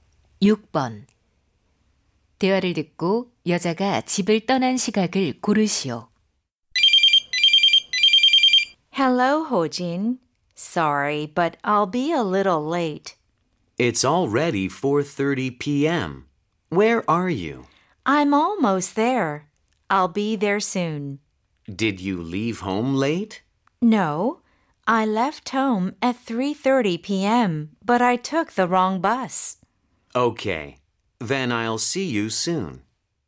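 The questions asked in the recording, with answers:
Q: 대화를 듣고 여자가 집을 떠난 시각을 고르시오.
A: 오후 3시 30분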